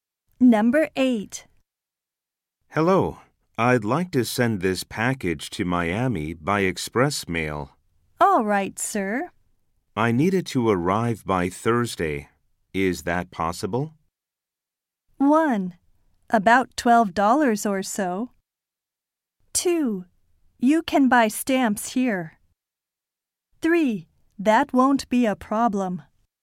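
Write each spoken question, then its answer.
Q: Is that possible?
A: 3: That won't be a problem.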